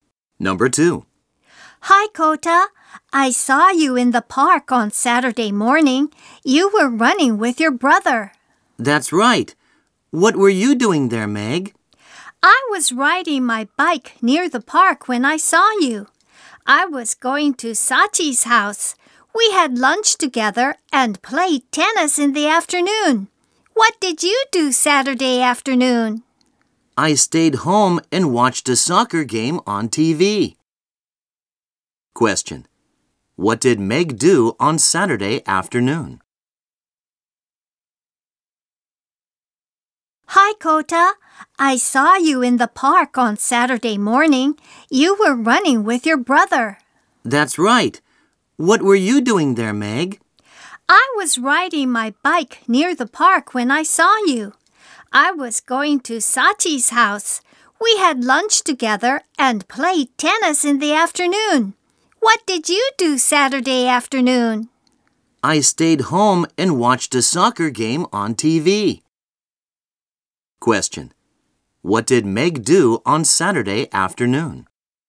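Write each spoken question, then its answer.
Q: What did Meg do on Saturday afternoon?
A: She played tennis with Sachi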